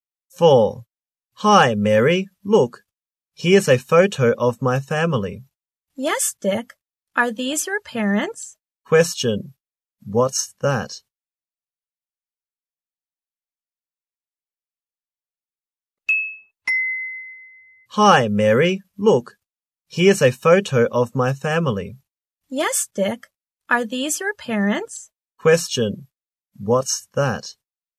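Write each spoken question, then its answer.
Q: What's that?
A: A photo of Dick's family.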